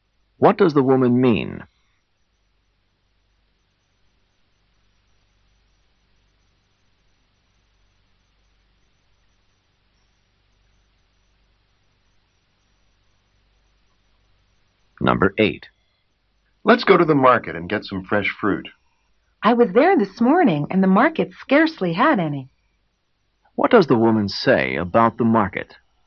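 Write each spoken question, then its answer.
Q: What does the woman say about the market?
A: It had very little fresh fruit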